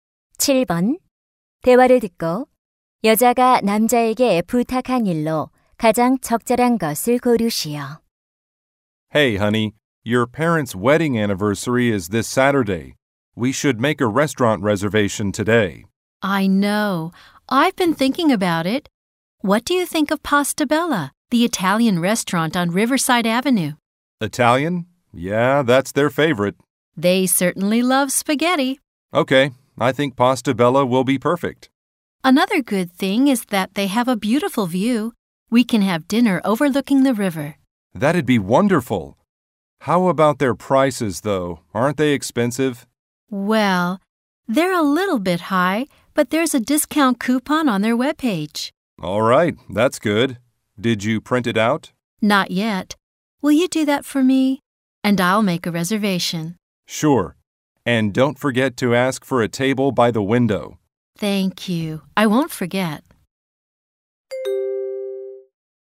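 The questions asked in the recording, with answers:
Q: 대화를 듣고 여자가 남자에게 부탁한 일로 가장 적절한 것을 고르시오.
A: 할인 쿠폰 출력하기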